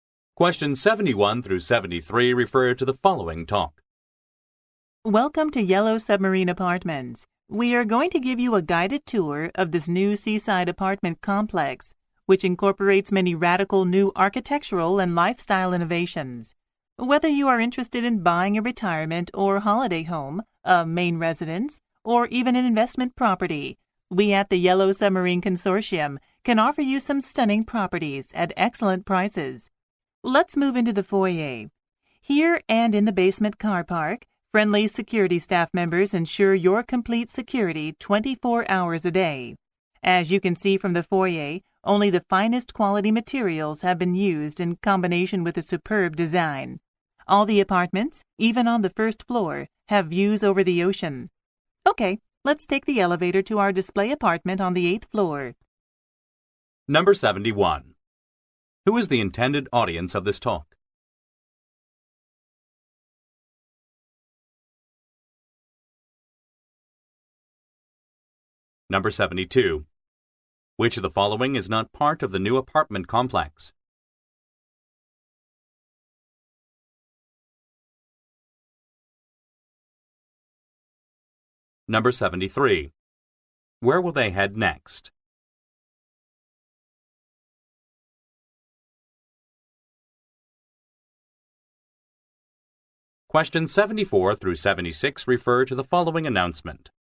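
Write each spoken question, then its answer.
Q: Who is the intended audience of this talk?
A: Potential buyers of apartments

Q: Where will they head next?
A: The display apartment on the 8th floor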